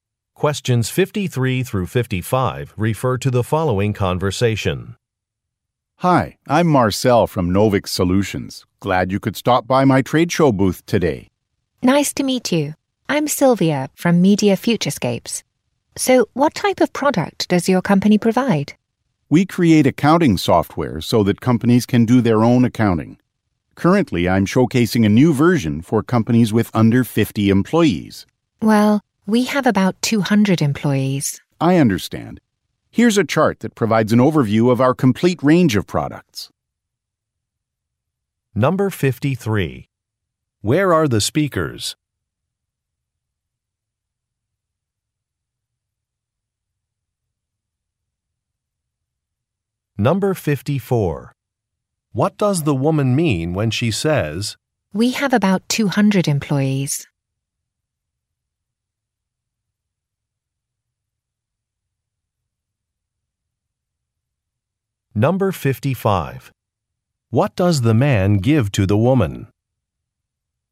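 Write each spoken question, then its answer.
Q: Where are the speakers?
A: At a trade show

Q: What does the man give to the woman?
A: A chart of the company's products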